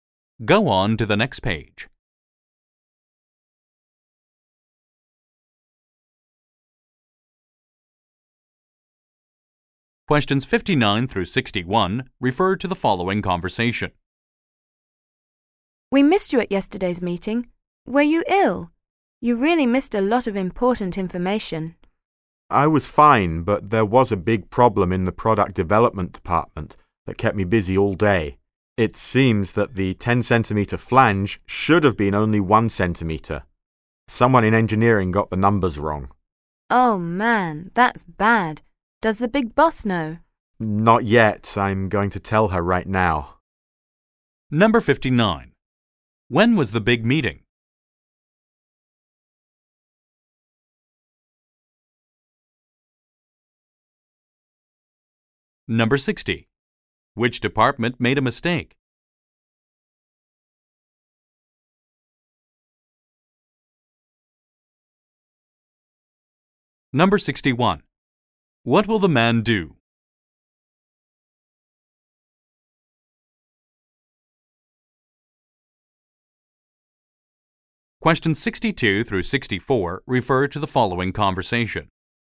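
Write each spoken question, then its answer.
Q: When was the big meeting?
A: Yesterday

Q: Which department made a mistake?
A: Engineering

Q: What will the man do?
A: Tell the boss about the problem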